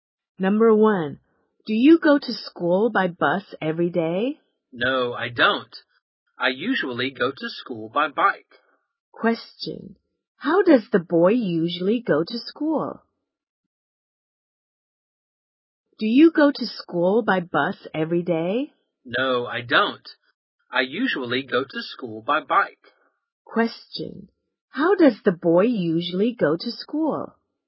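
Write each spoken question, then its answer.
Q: how does the boy usually go to school?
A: By bike.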